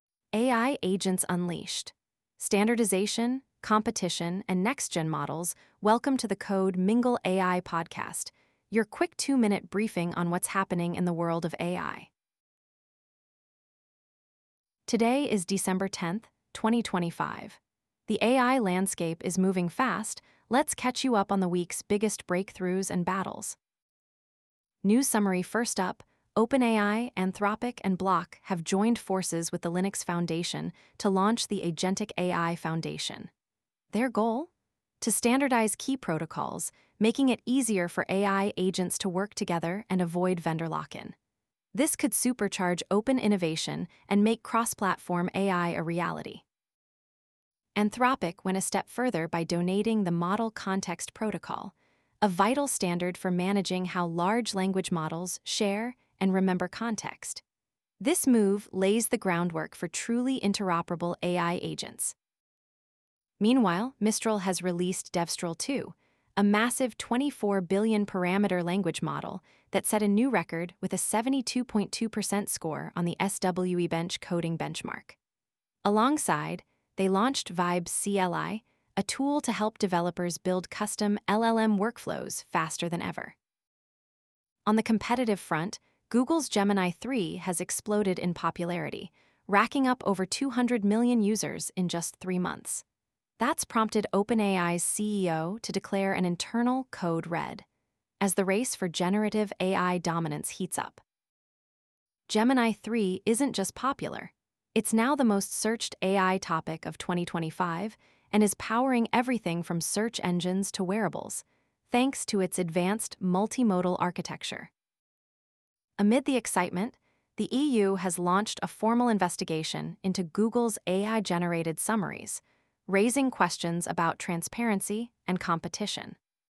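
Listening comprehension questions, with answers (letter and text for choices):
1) What is the primary goal of the Linux Foundation's new Agentic AI Foundation?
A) To create proprietary AI agents for commercial use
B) To standardize protocols and foster interoperability among AI agents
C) To develop consumer-facing facial recognition devices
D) To regulate antitrust issues in the AI industry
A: B) To standardize protocols and foster interoperability among AI agents

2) Which protocol did Anthropic donate to the Agentic AI Foundation?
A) Goose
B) AGENTS.md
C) Model Context Protocol (MCP)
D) Vibe CLI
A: C) Model Context Protocol (MCP)

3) What notable achievement did Mistral's Devstral 2 model reach?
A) Surpassed 200 million users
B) Achieved 72.2% verification on SWE-Bench coding tasks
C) Launched a new facial recognition system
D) Became the first open-source LLM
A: B) Achieved 72.2% verification on SWE-Bench coding tasks

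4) How did OpenAI reportedly respond to the rapid adoption of Google's Gemini 3?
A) By joining the Agentic AI Foundation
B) By launching a new facial recognition product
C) By declaring a 'Code Red' internally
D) By donating the Model Context Protocol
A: C) By declaring a 'Code Red' internally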